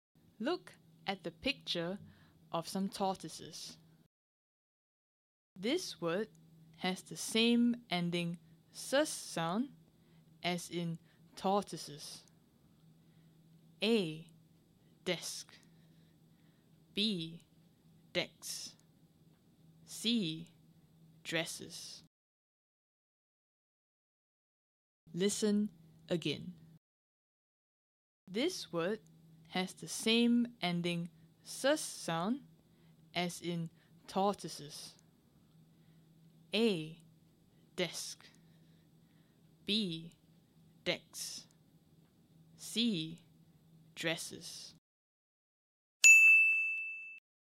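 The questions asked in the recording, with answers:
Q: This word has the same ending sus sound as in tortoises.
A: C: Dresses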